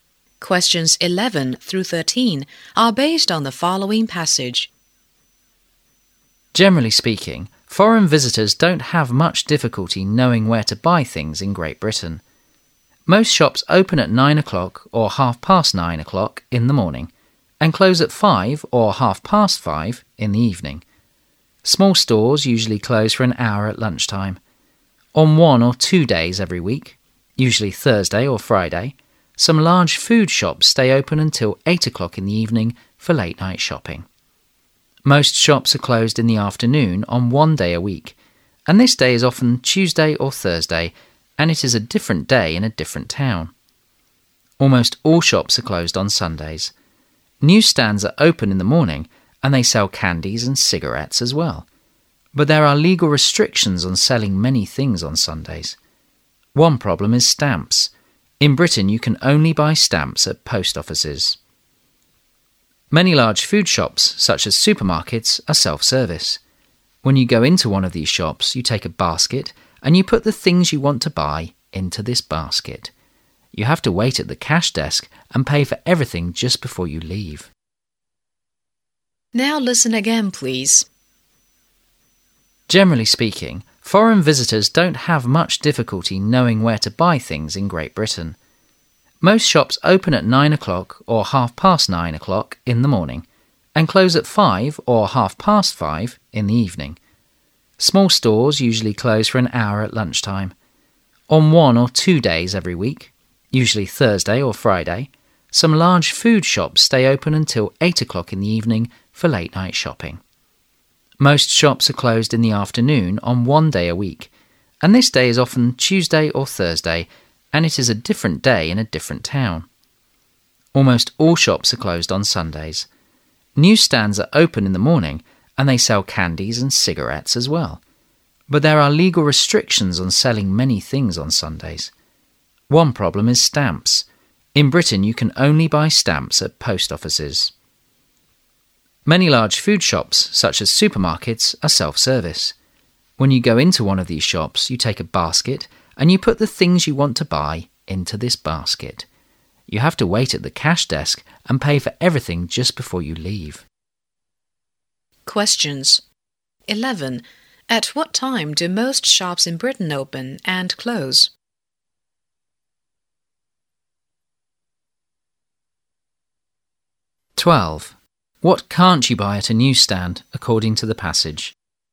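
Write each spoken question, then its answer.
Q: At what time do most shops in Britain open and close?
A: Open at 9 or 9:30 a.m., close at 5 or 5:30 p.m.

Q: What can't you buy at a newsstand, according to the passage?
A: Stamps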